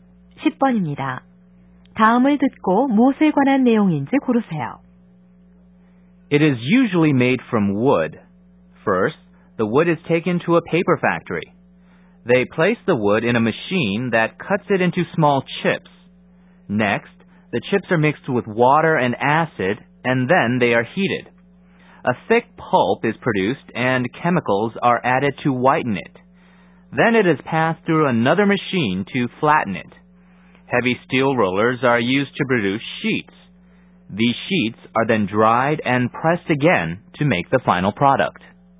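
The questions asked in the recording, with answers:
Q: 다음을 듣고 무엇에 관한 내용인지 고르세요.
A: 종이를 만드는 과정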